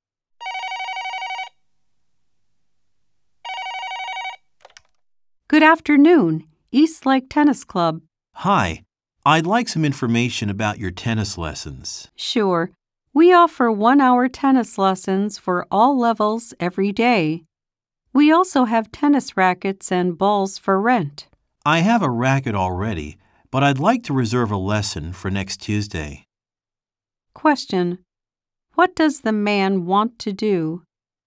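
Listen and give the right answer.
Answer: Reserve a tennis lesson for next Tuesday.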